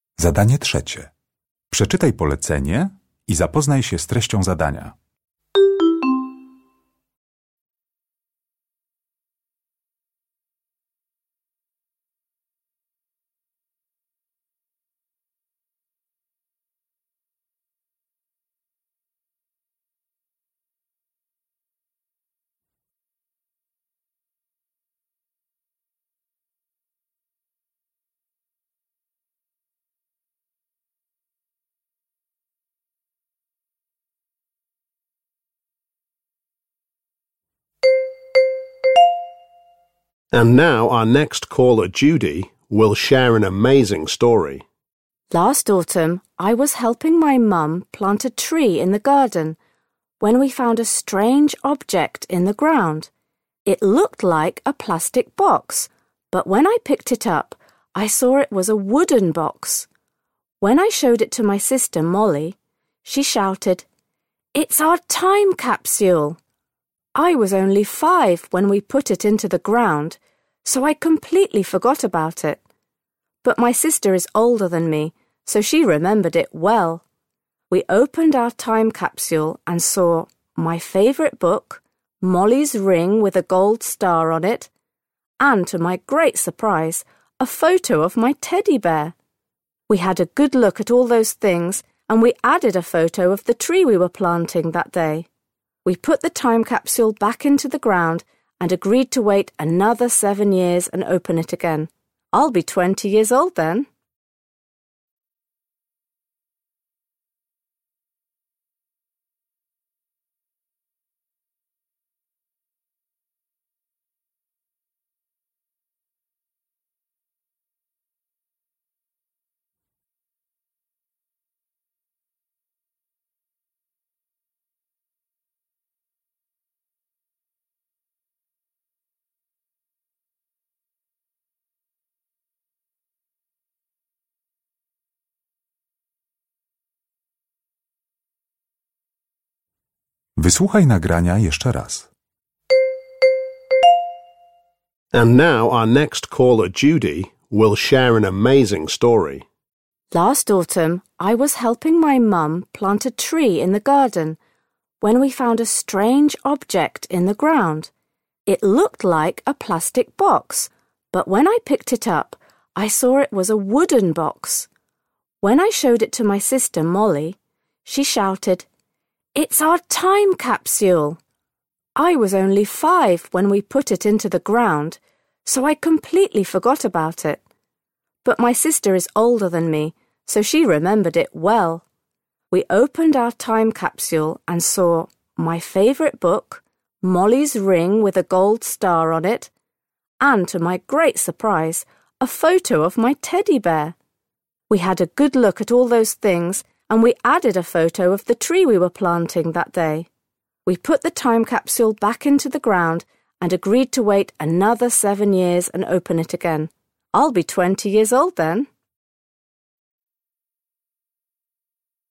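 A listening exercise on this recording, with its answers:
Uruchamiając odtwarzacz z oryginalnym nagraniem CKE usłyszysz dwukrotnie wypowiedź Judy o „kapsule czasu". Na podstawie informacji zawartych w nagraniu uzupełnij luki 3.1.–3.3. w notatce, tak aby jak najbardziej precyzyjnie oddać sens wysłuchanego tekstu. Luki należy uzupełnić w języku angielskim.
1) The time capsule was a box made of 3.1. _________________________ that the two sisters put into the ground in their garden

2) Judy was very surprised to find a photo of her 3.2. ________________________ in the time capsule.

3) The girls are going to open the time capsule again in 3.3. ___________________________ years' time.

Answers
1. wood
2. teddy bear
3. seven

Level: egzamin ósmoklasisty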